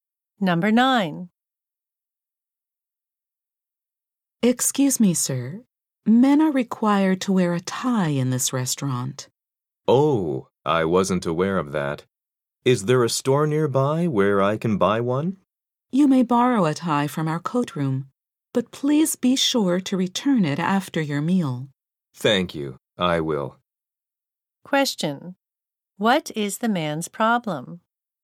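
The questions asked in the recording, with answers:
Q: What is the man's problem?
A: He is not wearing a tie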